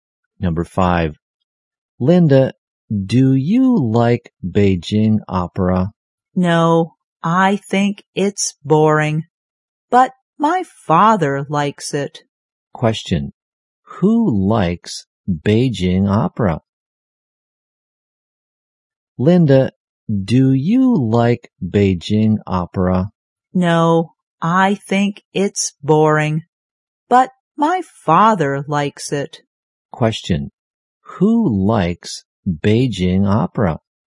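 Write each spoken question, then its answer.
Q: who likes Beijing opera?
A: Linda's father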